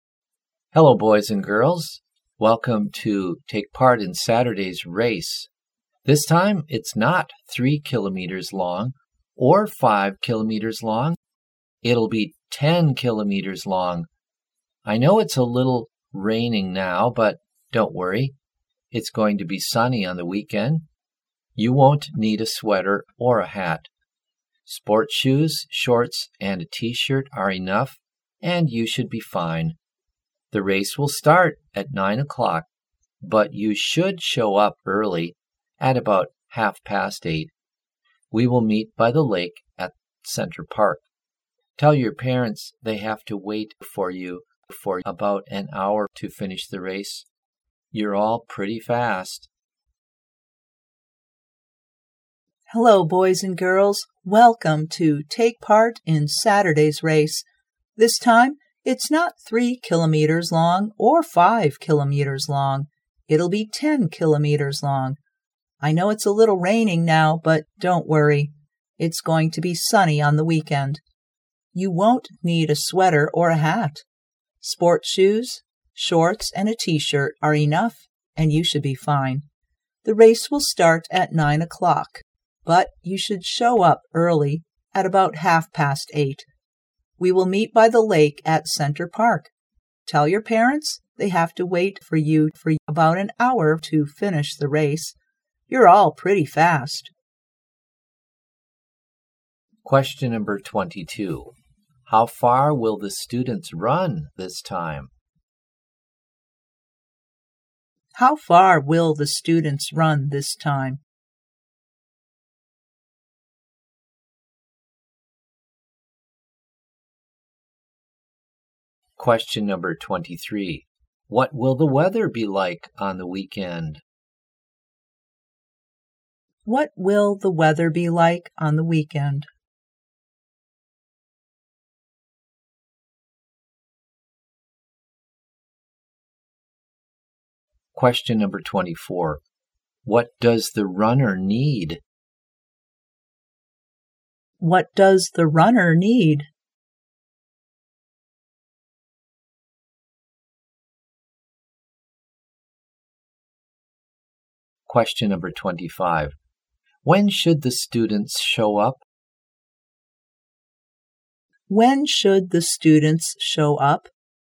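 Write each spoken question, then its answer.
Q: How far will the students run this time?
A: 10 kilometers

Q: What will the weather be like on the weekend?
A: Sunny

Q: What does the runner need?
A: Sports shoes, shorts and a T-shirt

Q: When should the students show up?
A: At about 8:30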